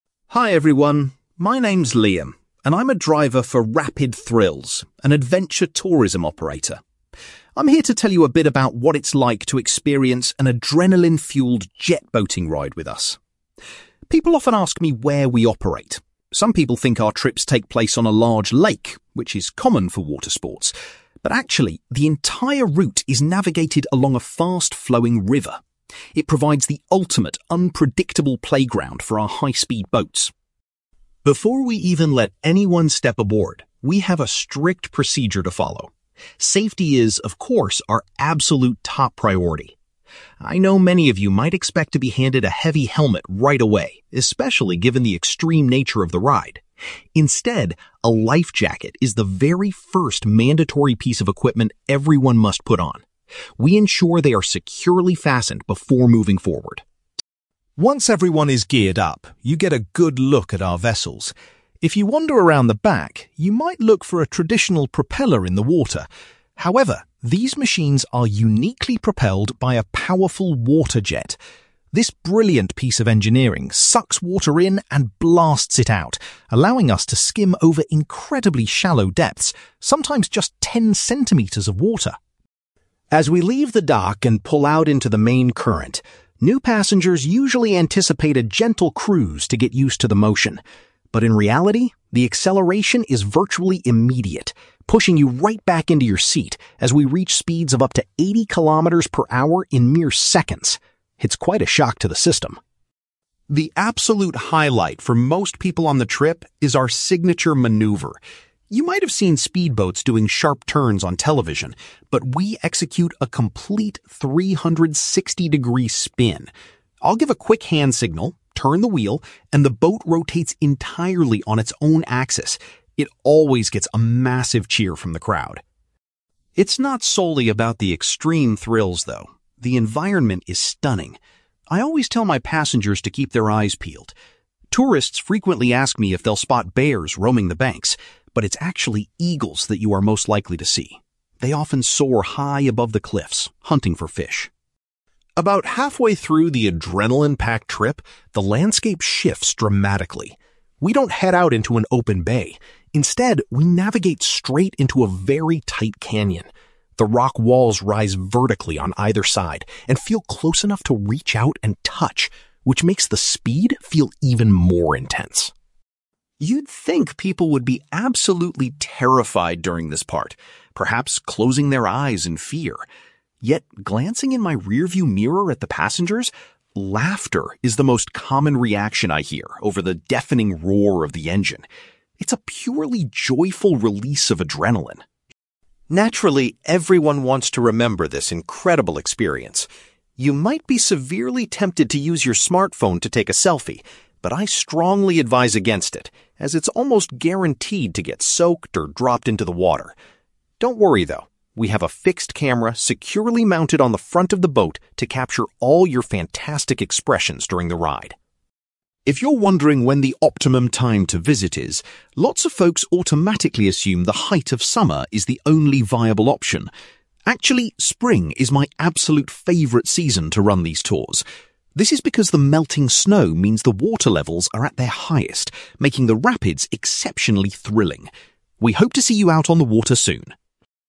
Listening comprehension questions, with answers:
You will hear a man called Liam giving a talk about his job as a jet-boat driver for an adventure tourism company. For questions 9-18, complete the sentences with a word or short phrase.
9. The jet-boating experience is conducted on a fast-moving (9)........................... rather than on a lake.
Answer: river

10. Passengers are required to put on a (10)........................... before they can board the boat.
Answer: life jacket

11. Liam explains that the boats use a (11)........................... instead of a propeller to move.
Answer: water jet

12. Riders are frequently surprised by the sudden (12)........................... at the start of the trip.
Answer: acceleration

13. Liam says the boat's 360-degree (13)........................... is the most popular part of the journey.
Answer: spin

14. Liam recommends that passengers look out for (14)........................... flying above them.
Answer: eagles

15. The boat travels through a narrow (15)........................... where the rock walls are extremely close.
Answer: canyon

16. Liam notes that (16)........................... is the main sound he hears from the passengers.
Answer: laughter

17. A special (17)........................... at the front of the boat takes pictures of the passengers.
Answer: camera

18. Liam suggests taking the ride in the (18)........................... when the river is full of water.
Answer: spring

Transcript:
Liam: Hi everyone, my name's Liam, and I'm a driver for Rapid Thrills, an adventure tourism operator. I'm here to tell you a bit about what it's like to experience an adrenaline-fuelled jet-boating ride with us. People often ask me where we operate. Some people think our trips take place on a large lake, which is common for water sports, but actually, the entire route is navigated along a fast-flowing river. It provides the ultimate unpredictable playground for our high-speed boats.
Before we even let anyone step aboard, we have a strict procedure to follow. Safety is, of course, our absolute top priority. I know many of you might expect to be handed a heavy helmet right away, especially given the extreme nature of the ride. Instead, a life jacket is the very first mandatory piece of equipment everyone must put on. We ensure they are securely fastened before moving forward.
Once everyone is geared up, you get a good look at our vessels. If you wander around the back, you might look for a traditional propeller in the water. However, these machines are uniquely propelled by a powerful water jet. This brilliant piece of engineering sucks water in and blasts it out, allowing us to skim over incredibly shallow depths—sometimes just ten centimetres of water!
As we leave the dock and pull out into the main current, new passengers usually anticipate a gentle cruise to get used to the motion. But in reality, the acceleration is virtually immediate, pushing you right back into your seat as we reach speeds of up to eighty kilometres per hour in mere seconds. It's quite a shock to the system!
The absolute highlight for most people on the trip is our signature maneuver. You might have seen speedboats doing sharp turns on television, but we execute a complete 360-degree spin. I'll give a quick hand signal, turn the wheel, and the boat rotates entirely on its own axis. It always gets a massive cheer from the crowd.
It's not solely about the extreme thrills, though; the environment is stunning. I always tell my passengers to keep their eyes peeled. Tourists frequently ask me if they'll spot bears roaming the banks, but it's actually eagles that you are most likely to see. They often soar high above the cliffs, hunting for fish.
About halfway through the adrenaline-packed trip, the landscape shifts dramatically. We don't head out into an open bay; instead, we navigate straight into a very tight canyon. The rock walls rise vertically on either side and feel close enough to reach out and touch, which makes the speed feel even more intense.
You'd think people would be absolutely terrified during this part, perhaps closing their eyes in fear. Yet, glancing in my rearview mirror at the passengers, laughter is the most common reaction I hear over the deafening roar of the engine. It's a purely joyful release of adrenaline.
Naturally, everyone wants to remember this incredible experience. You might be severely tempted to use your smartphone to take a selfie, but I strongly advise against it, as it's almost guaranteed to get soaked or dropped into the water. Don't worry, though; we have a fixed camera securely mounted on the front of the boat to capture all your fantastic expressions during the ride.
If you're wondering when the optimum time to visit is, lots of folks automatically assume the height of summer is the only viable option. Actually, spring is my absolute favourite season to run these tours. This is because the melting snow means the water levels are at their highest, making the rapids exceptionally thrilling. We hope to see you out on the water soon!

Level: B2